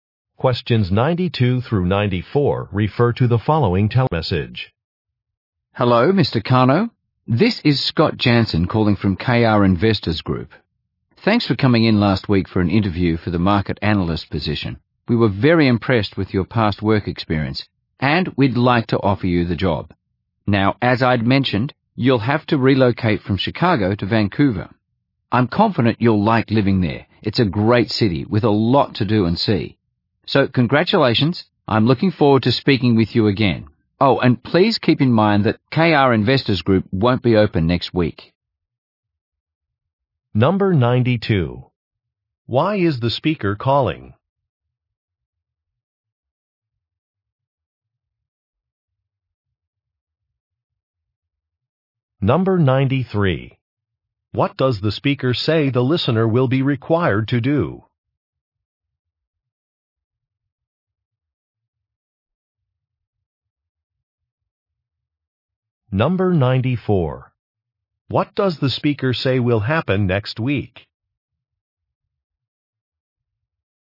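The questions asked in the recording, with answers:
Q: Why is the speaker calling?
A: To offer the listener a job

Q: What does the speaker say the listener will be required to do?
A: Relocate from Chicago to Vancouver

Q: What does the speaker say will happen next week?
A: The company will be closed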